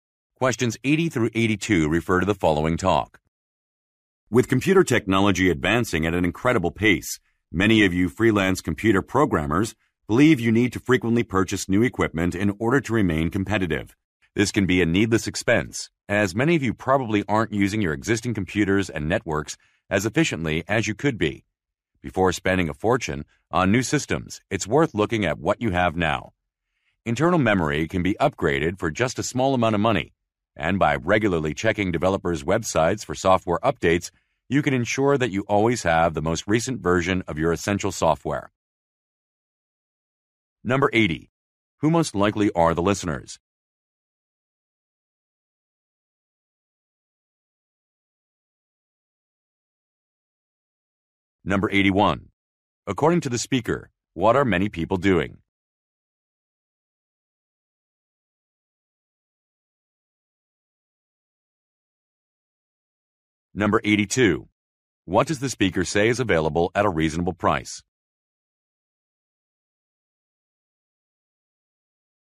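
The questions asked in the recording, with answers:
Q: Who most likely are the listeners?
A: Freelance computer programmers

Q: What does the speaker say is available at a reasonable price?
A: Internal memory upgrades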